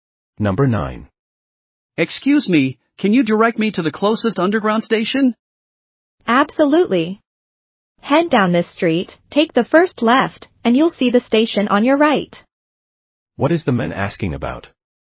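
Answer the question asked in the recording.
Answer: Directions to the closest underground station.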